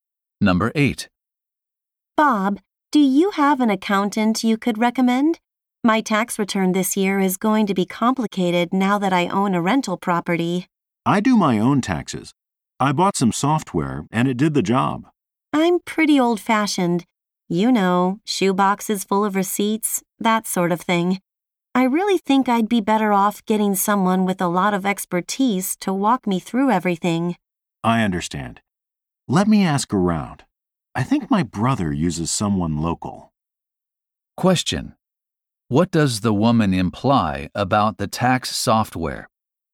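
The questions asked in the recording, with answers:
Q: What does the woman imply about the tax software?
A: It would not be enough for her complicated tax return.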